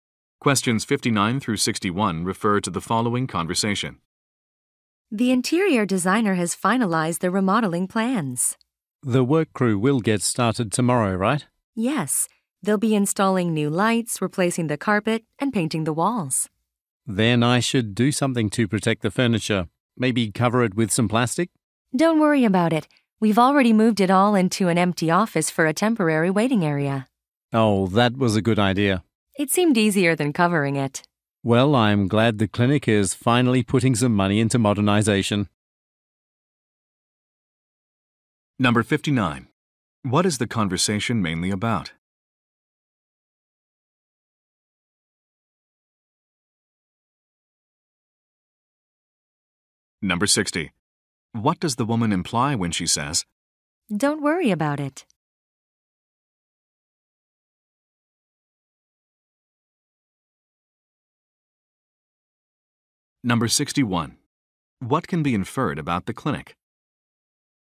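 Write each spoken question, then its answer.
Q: What is the conversation mainly about?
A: A remodeling project

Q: What does the woman imply when she says,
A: The furniture has already been moved, so it needn't be covered

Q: What can be inferred about the clinic?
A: It is being modernized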